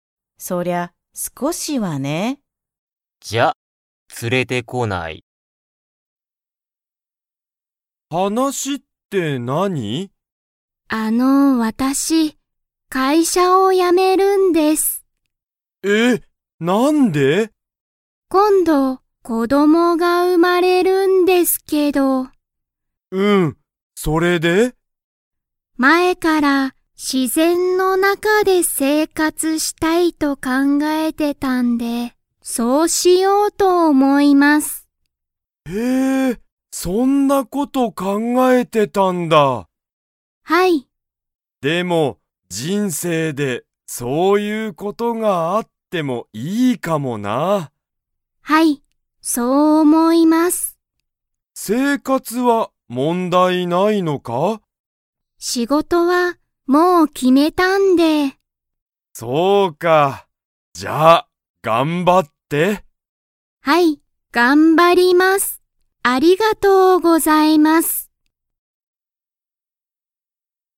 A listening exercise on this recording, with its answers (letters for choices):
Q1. 鈴木(すずき)さんは、____で生活(せいかつ)したいと考(かんが)えた。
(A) 自然(しぜん)の中(なか)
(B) 大(おお)きい町(まち)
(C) 会社(かいしゃ)の近(ちか)く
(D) 遠(とお)い所(ところ)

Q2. 鈴木(すずき)さんは、もう仕事(しごと)が決(き)まりましたか?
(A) はい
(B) いいえ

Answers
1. A
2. A

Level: Level 2